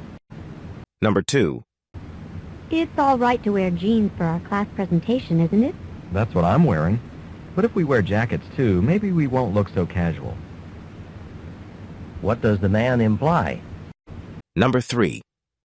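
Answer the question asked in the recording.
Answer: They should wear jackets with their jeans so they look less casual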